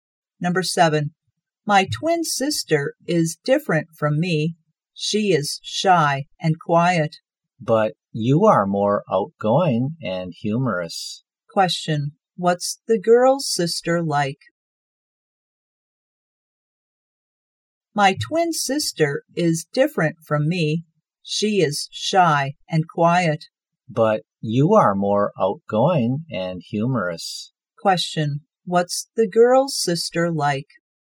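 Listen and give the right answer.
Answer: Shy and quiet.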